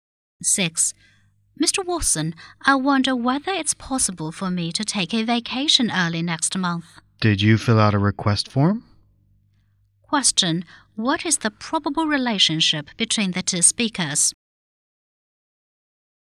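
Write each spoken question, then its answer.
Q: what is the probable relationship between the two speakers?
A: Employee and boss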